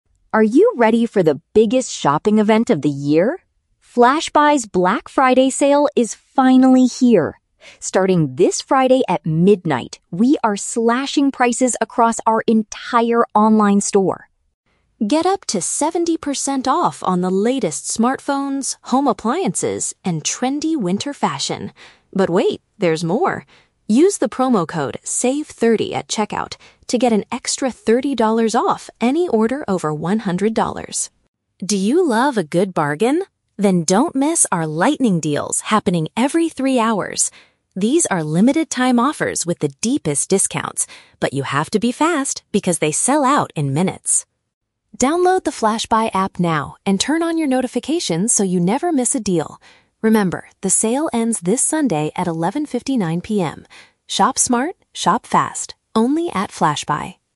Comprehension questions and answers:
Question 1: When does the Black Friday Sale officially begin?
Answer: At the very start of the day this Friday.

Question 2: What is required to use the promo code "SAVE30"?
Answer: The total value of the order must be at least one hundred dollars.

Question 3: What is special about the "Lightning Deals" mentioned in the ad?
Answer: They are updated every three hours throughout the event.

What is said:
Voiceover: Are you ready for the biggest shopping event of the year? FlashBuy's Black Friday Sale is finally here! Starting this Friday at midnight, we are slashing prices across our entire online store.
Get up to 70% off on the latest smartphones, home appliances, and trendy winter fashion. But wait, there's more! Use the promo code "SAVE30" at checkout to get an extra thirty dollars off any order over one hundred dollars.
Do you love a good bargain? Then don't miss our "Lightning Deals" happening every three hours. These are limited-time offers with the deepest discounts, but you have to be fast because they sell out in minutes!
Download the FlashBuy app now and turn on your notifications so you never miss a deal. Remember, the sale ends this Sunday at 11:59 PM. Shop smart, shop fast, only at FlashBuy!